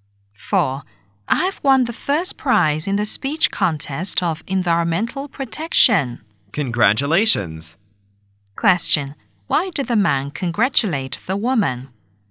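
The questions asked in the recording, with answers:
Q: Why did the man congratulate the woman?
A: She won first prize in the environmental protection speech contest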